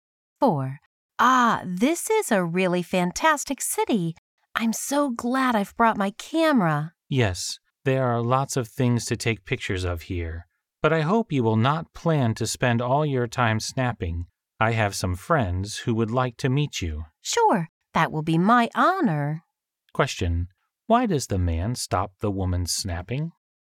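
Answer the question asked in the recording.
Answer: He has friends who would like to meet her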